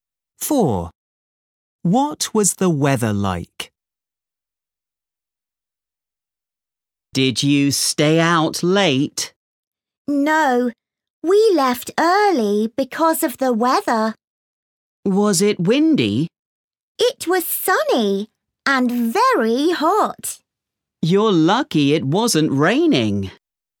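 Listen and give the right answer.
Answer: sunny and very hot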